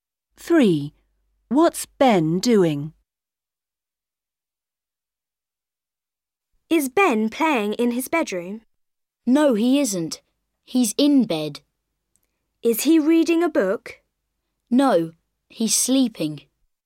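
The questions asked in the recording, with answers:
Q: What's Ben doing?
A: sleeping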